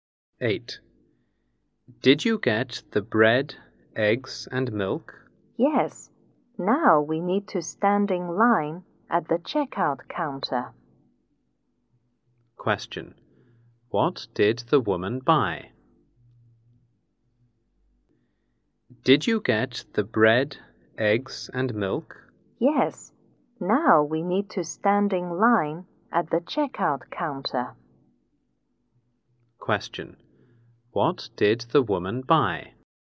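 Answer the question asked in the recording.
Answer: Bread, eggs, and milk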